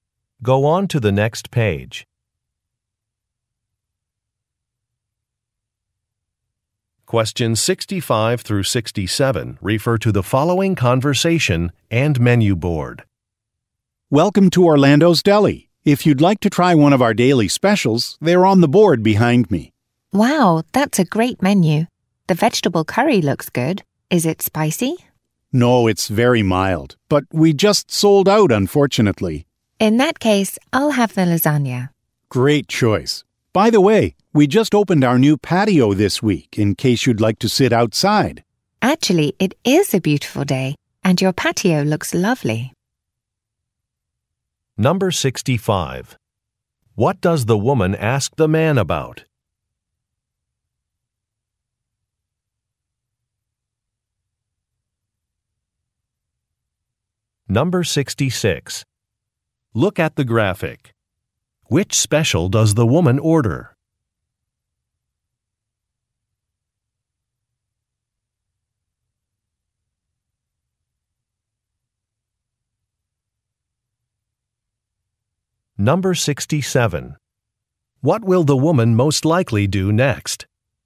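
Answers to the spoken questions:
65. Whether the vegetable curry is spicy
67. Sit outside on the patio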